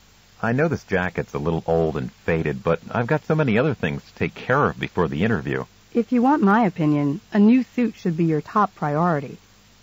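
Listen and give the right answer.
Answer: Buy a new suit before the interview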